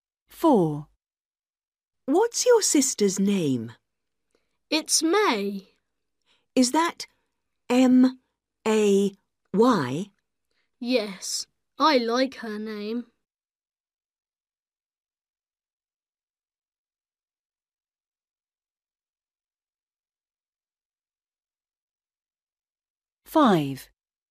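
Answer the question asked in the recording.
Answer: May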